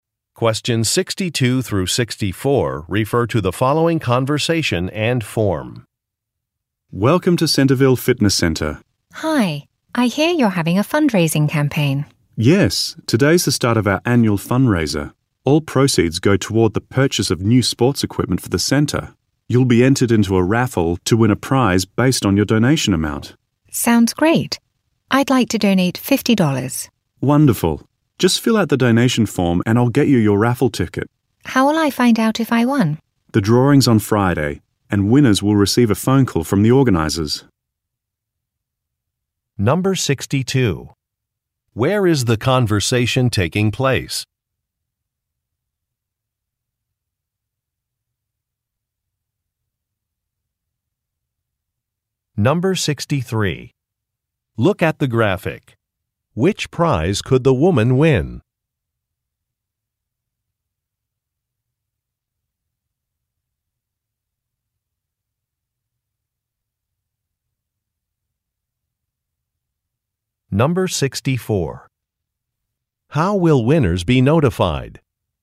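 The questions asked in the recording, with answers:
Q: Where is the conversation taking place?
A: At a fitness center

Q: How will winners be notified?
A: By a phone call from the organizers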